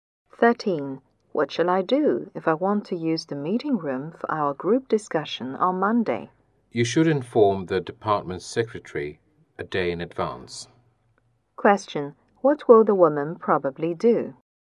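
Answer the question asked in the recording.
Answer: Inform the department secretary a day in advance.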